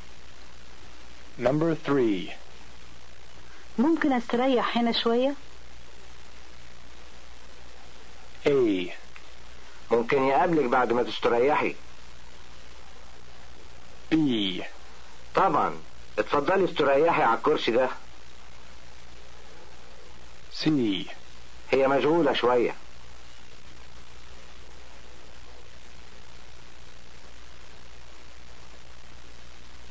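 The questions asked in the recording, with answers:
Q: ممكن استريح هنا شوية؟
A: B: طبعا اتفضلي استريحي على الكرسي ده.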